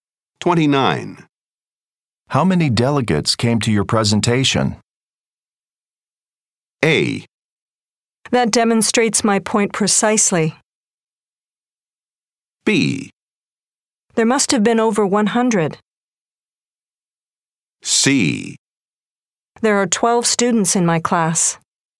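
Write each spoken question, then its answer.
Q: How many delegates came to your presentation?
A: B: There must have been over 100.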